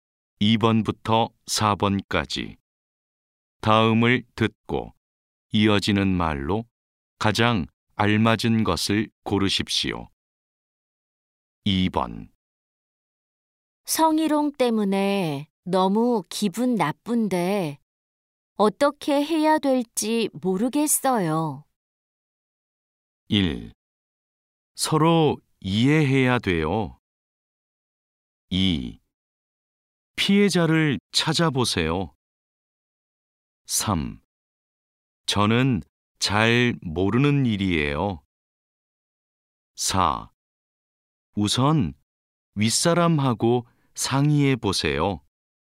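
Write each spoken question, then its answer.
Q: 성희롱 때문에 너무 기분 나쁜데 어떻게 해야 될지 모르겠어요.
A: 4: 우선 윗사람하고 상의해 보세요.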